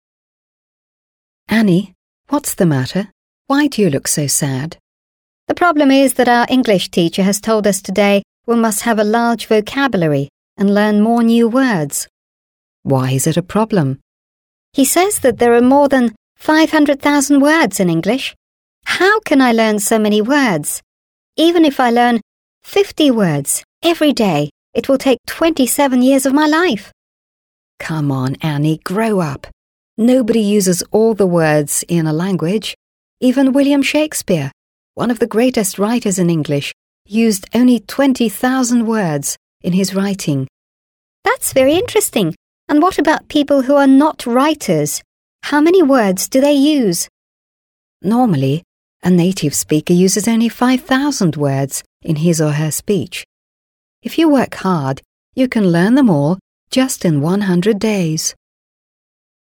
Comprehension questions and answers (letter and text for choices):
Listen to the dialogue and complete the sentences.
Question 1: Annie's teacher says she must know a lot of ... .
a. poems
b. words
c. texts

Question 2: There are more than ... words in English.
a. 100,000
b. 50,000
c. 500,000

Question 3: William Shakespeare used ... words in his works.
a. 20,000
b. 12,000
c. 2,000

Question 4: Annie thinks that she'll have to learn ... new words every day.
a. 27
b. 40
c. 50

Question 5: If Annie ..., she can learn all the words just in 100 days.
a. is lazy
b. grows up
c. works hard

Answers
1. b. words
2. c. 500,000
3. a. 20,000
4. c. 50
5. c. works hard

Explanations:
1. В самом начале диалога Энни жалуется: «The problem is that our English teacher has told us today we must have a large vocabulary and learn more new words» (Проблема в том, что наш учитель английского сказал нам сегодня, что мы должны иметь большой словарный запас и учить больше новых слов). Слова vocabulary и words здесь являются ключевыми. Варианты про стихи (poems) или тексты (texts) в диалоге не упоминались.
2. Энни приводит слова учителя как аргумент своей печали: «He says that there are more than 500,000 words in English» (Он говорит, что в английском языке более 500 000 слов). В английском языке это число произносится как five hundred thousand.
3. Собеседник Энни успокаивает её, приводя пример известного писателя: «Even William Shakespeare... used only 20,000 words in his writing» (Даже Уильям Шекспир... использовал всего лишь 20 000 слов в своих трудах). Число произносится как twenty thousand.
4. Энни делает математический расчет: «Even if I learn 50 words every day, it will take 27 years of my life» (Даже если я буду учить по 50 слов каждый день, это займет 27 лет моей жизни). Здесь 50 — это количество слов, а 27 — это количество лет, поэтому важно не перепутать эти цифры.
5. В конце диалога друг дает совет: «If you work hard, you can learn them all just in 100 days» (Если ты будешь усердно трудиться, ты сможешь выучить их все всего за 100 дней). Здесь используется грамматическая конструкция First Conditional (Условное наклонение 1-го типа). В придаточной части с If мы используем Present Simple (works hard), хотя на русский язык переводим будущим временем («будет работать»). Вариант is lazy (ленится) не подходит по смыслу, а grows up (повзрослеет) был использован ранее в другом контексте.

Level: 7 класс